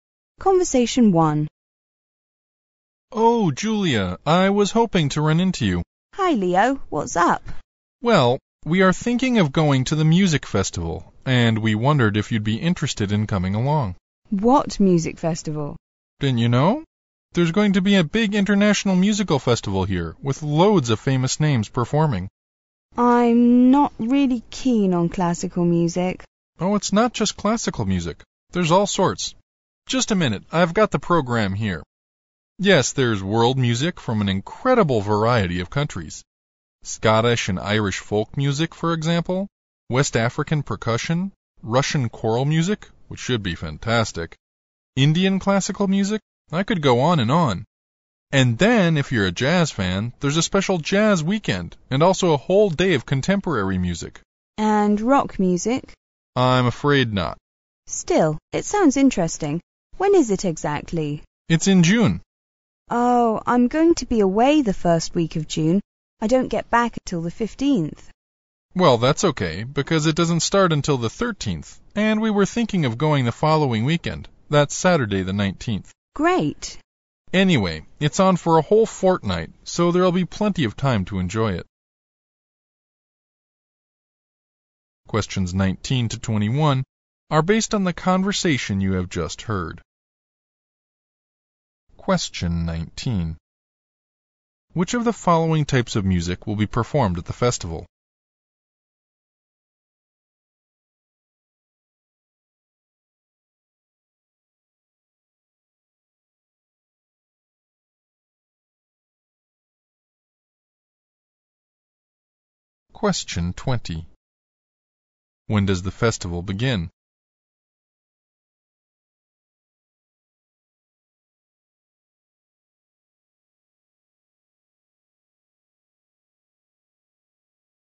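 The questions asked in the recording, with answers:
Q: When does the festival begin?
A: On June 13th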